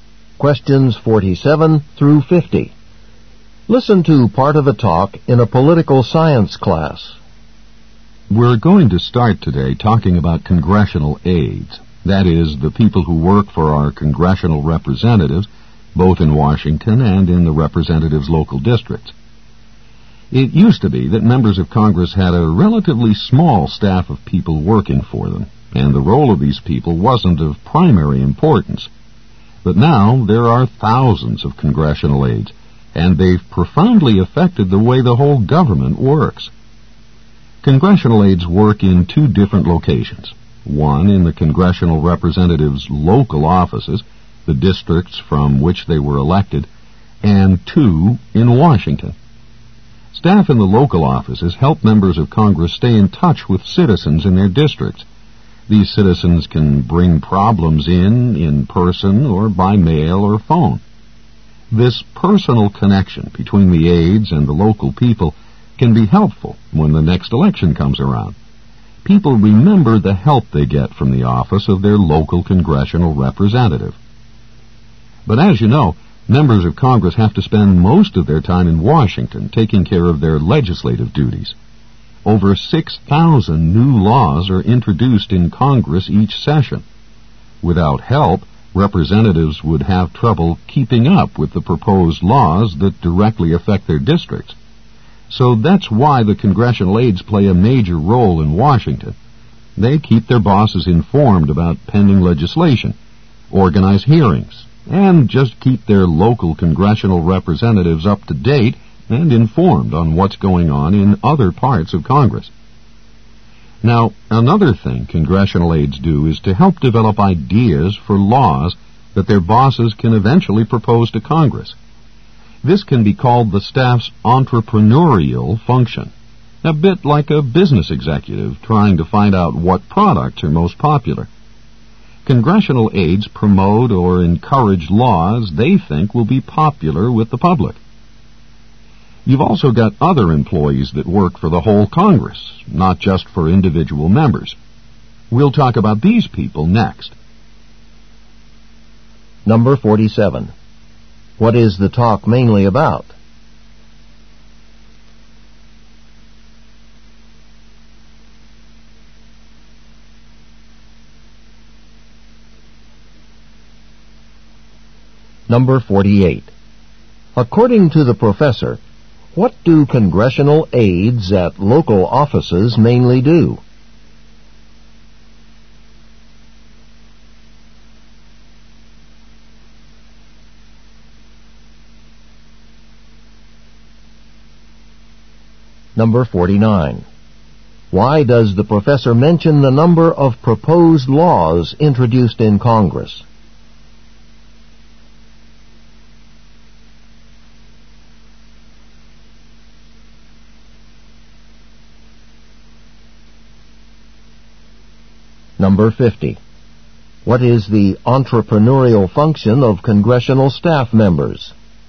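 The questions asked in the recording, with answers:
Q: What is the talk mainly about?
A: The role of congressional aides.

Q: According to the professor, what do congressional aides at local offices mainly do?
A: Help members of Congress stay in touch with citizens in their districts.

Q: Why does the professor mention the number of proposed laws introduced in Congress?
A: To show why representatives need aides to keep up with legislation.

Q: What is the entrepreneurial function of congressional staff members?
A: Developing and promoting ideas for laws that will be popular.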